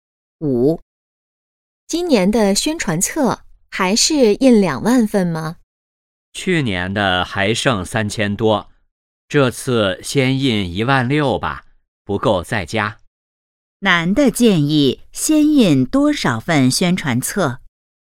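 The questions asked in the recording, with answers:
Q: 男的建议先印多少份宣传册?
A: 16000份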